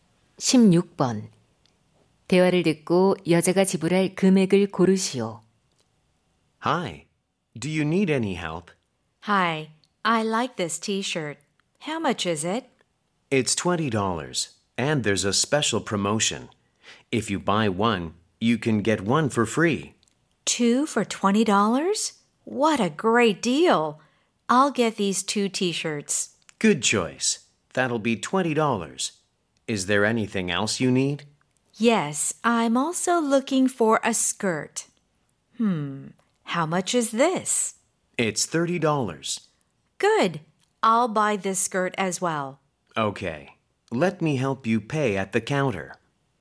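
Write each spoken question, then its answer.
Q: 대화를 듣고 여자가 지불할 금액을 고르시오.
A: 50달러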